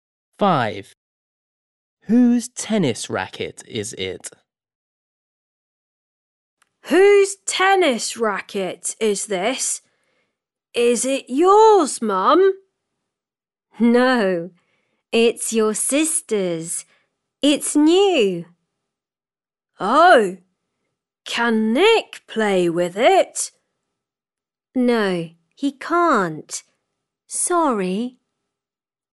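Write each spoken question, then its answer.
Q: Whose tennis racket is it?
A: his sister's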